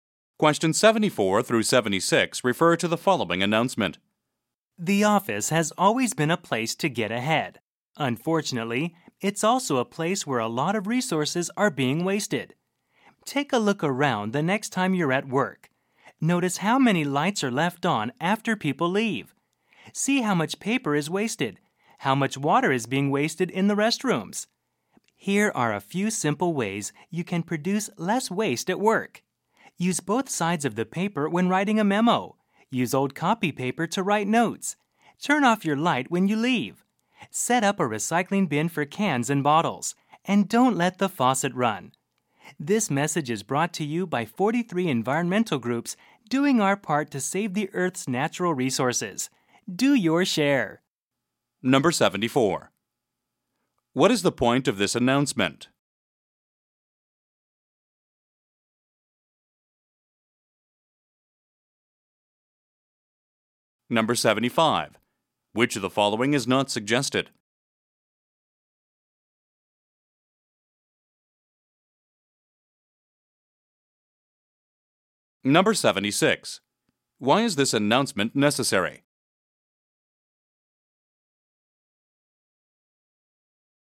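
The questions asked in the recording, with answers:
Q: What is the point of this announcement?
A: To encourage people to produce less waste at work

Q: Why is this announcement necessary?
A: A lot of resources are wasted in offices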